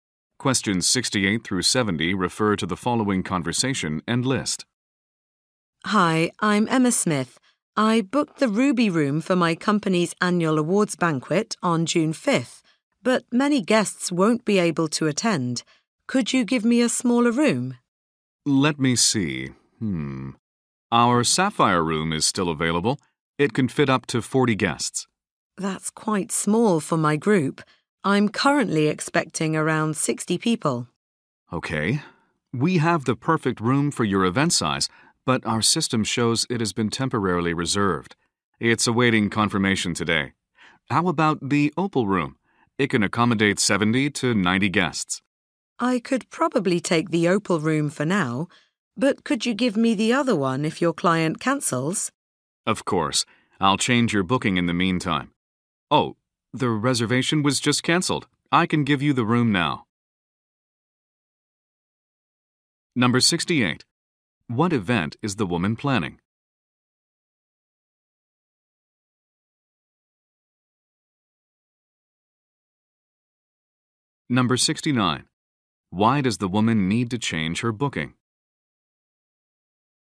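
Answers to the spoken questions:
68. Her company's annual awards banquet.
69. Fewer guests will attend.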